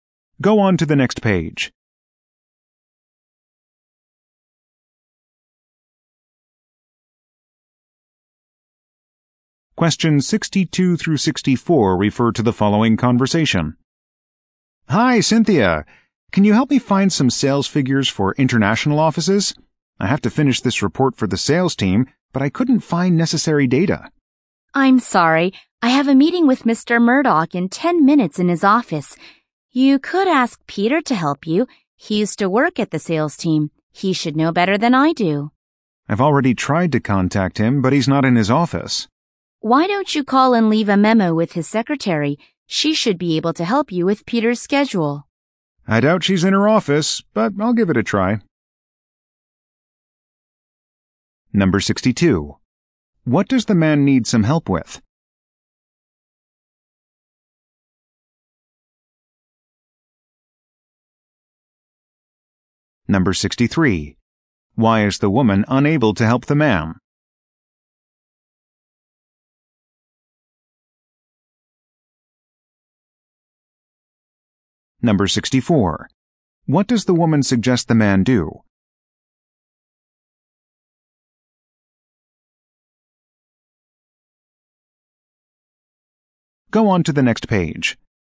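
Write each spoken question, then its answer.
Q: What does the man need some help with?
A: Finding sales figures for international offices

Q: Why is the woman unable to help the man?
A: She has a meeting with Mr. Murdoch

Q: What does the woman suggest the man do?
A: Call and leave a memo with Peter's secretary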